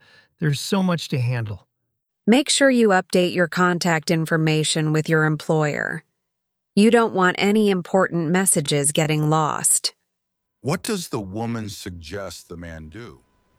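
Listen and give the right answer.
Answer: Update his contact information with his employer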